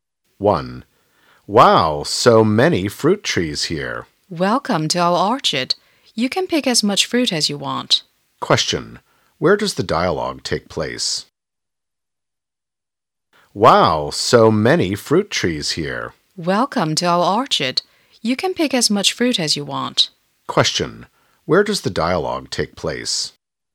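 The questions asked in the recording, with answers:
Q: Question, where does the dialogue take place?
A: In an orchard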